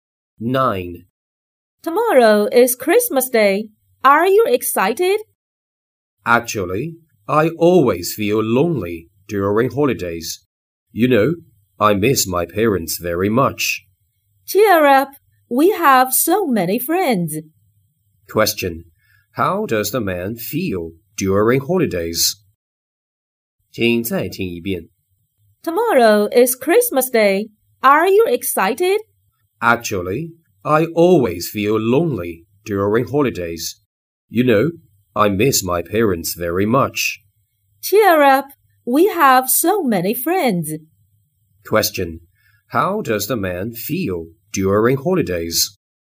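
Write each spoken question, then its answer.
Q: How does the man feel during holidays?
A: Lonely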